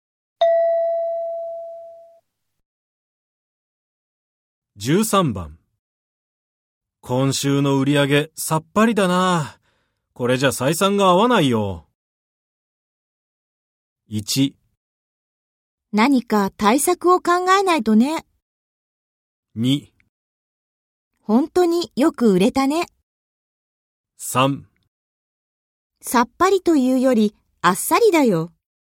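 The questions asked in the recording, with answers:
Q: 今週の売り上げさっぱりだな。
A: 1: 何か対策を考えないとね。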